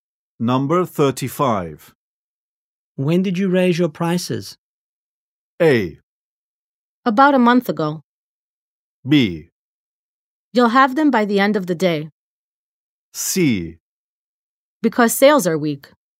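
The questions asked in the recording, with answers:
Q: When did you raise your prices?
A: A: About a month ago.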